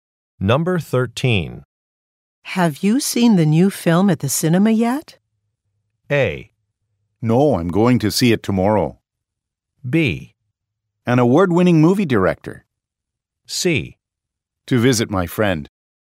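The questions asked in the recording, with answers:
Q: Have you seen the new film at the cinema yet?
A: A: No, I'm going to see it tomorrow.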